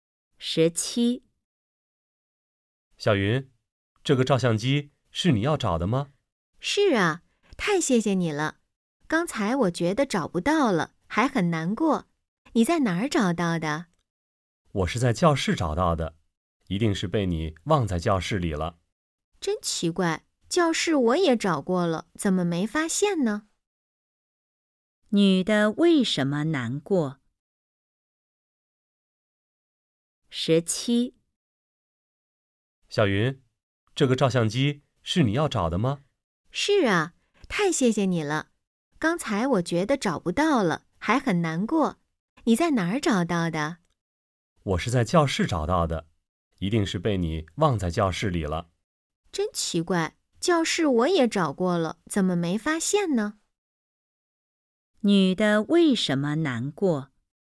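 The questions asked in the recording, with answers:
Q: 女的为什么难过?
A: 她以为照相机找不到了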